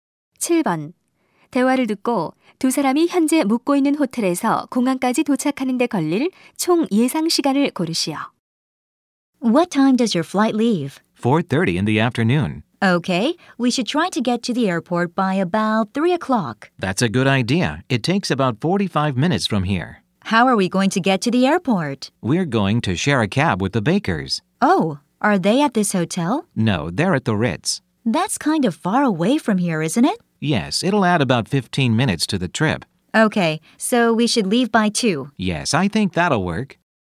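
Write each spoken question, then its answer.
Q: 대화를 듣고 두 사람이 현재 묵고 있는 호텔에서 공항까지 도착하는 데 걸릴 총 예상 시간을 고르시오.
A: 1시간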